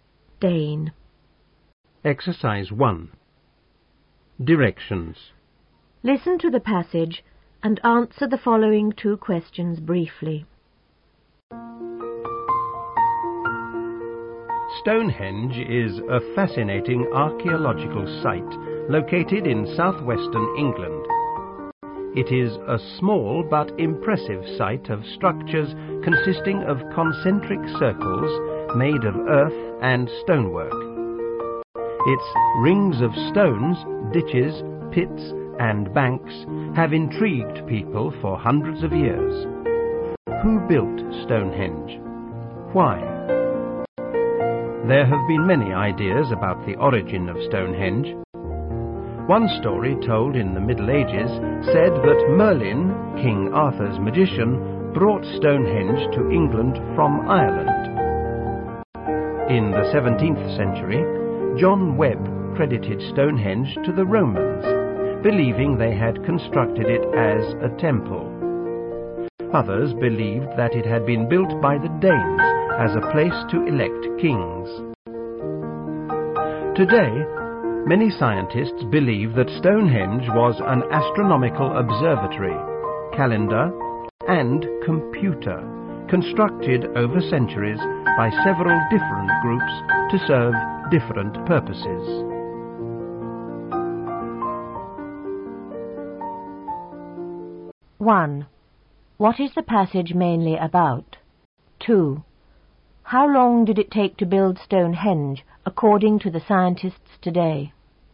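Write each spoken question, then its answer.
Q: What is the passage mainly about?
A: Ideas about the origin of Stonehenge

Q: How long did it take to build Stonehenge, according to the scientists today?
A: Centuries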